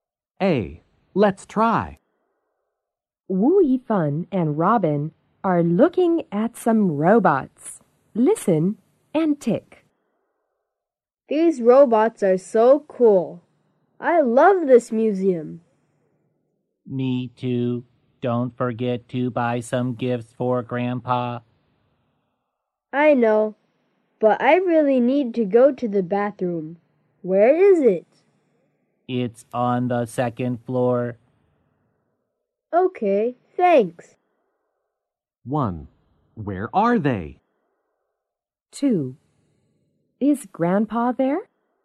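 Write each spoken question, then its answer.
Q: Is Grandpa there?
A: No.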